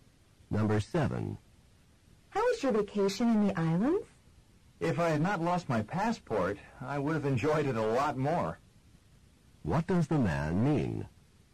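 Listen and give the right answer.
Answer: He lost his passport and did not enjoy the vacation much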